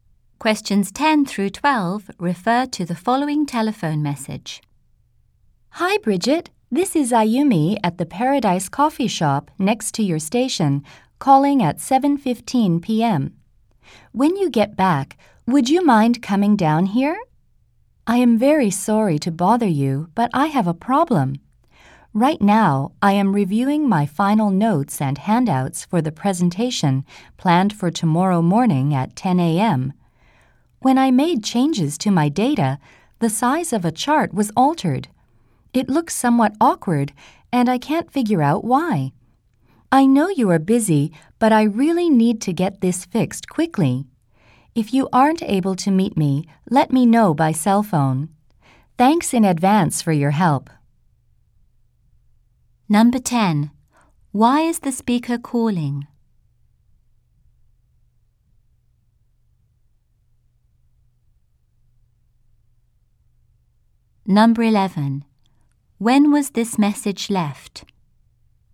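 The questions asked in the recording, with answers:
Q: Why is the speaker calling?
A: To ask Bridget to come help fix a problem with a chart in her presentation

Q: When was this message left?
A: At 7:15 p.m.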